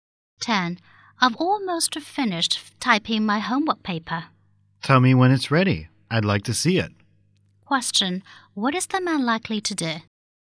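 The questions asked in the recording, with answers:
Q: What is the man likely to do?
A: Read the woman's homework paper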